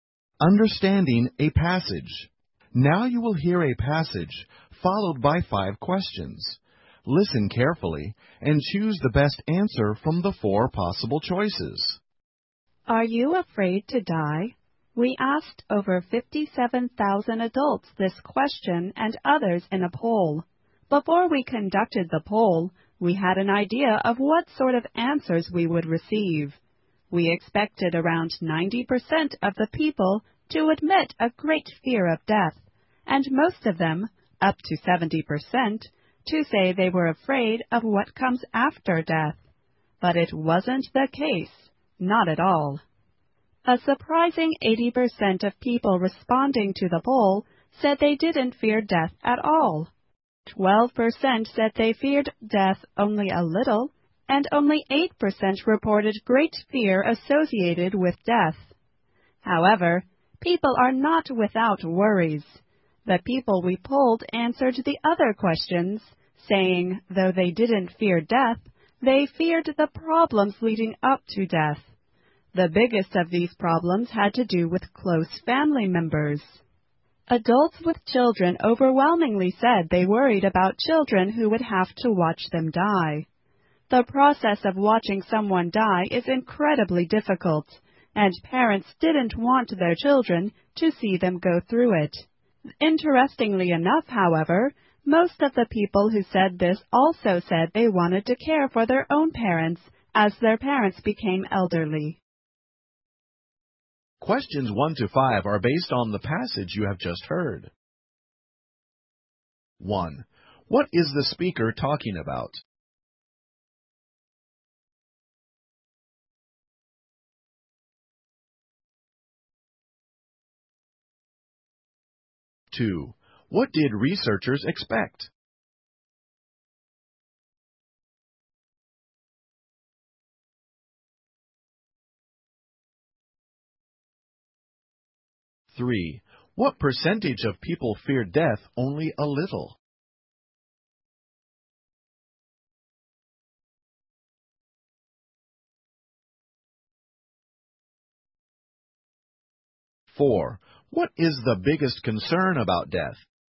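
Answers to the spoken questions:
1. A poll about people's fear of death.
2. That about 90% of people would admit a great fear of death.
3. 12%
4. Their children having to watch them die.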